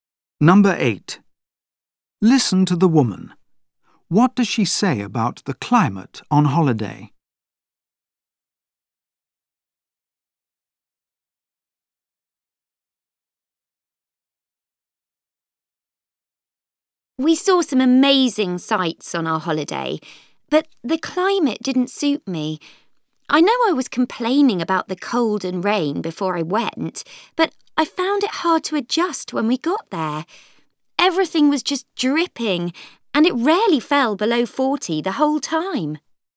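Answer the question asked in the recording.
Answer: It was too hot and humid for her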